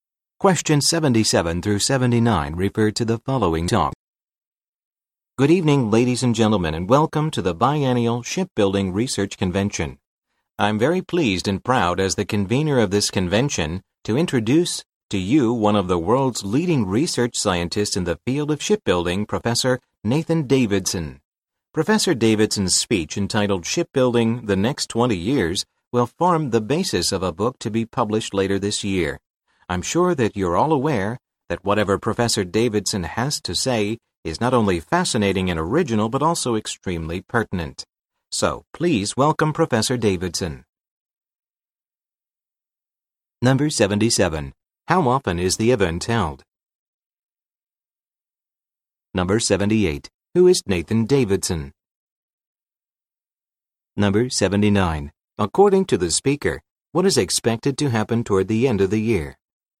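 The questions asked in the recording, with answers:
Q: How often is the event held?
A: Every two years

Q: Who is Nathan Davidson?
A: A leading research scientist in shipbuilding

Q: According to the speaker, what is expected to happen toward the end of the year?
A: A book based on his speech will be published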